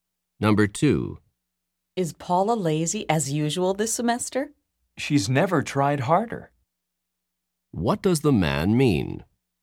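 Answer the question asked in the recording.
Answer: Paula is working harder than ever, not lazy.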